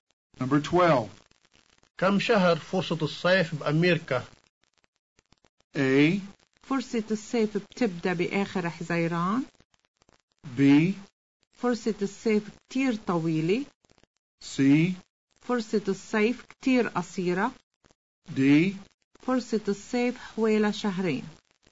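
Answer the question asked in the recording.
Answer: D: فرصة الصيف حوالي شهرين.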